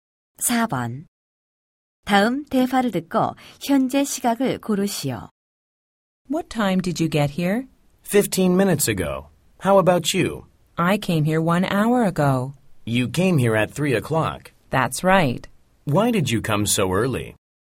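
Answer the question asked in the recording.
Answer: 4시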